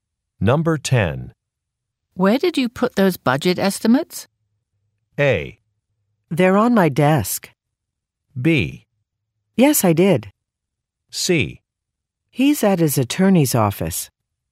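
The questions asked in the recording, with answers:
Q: Where did you put those budget estimates?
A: A: They're on my desk.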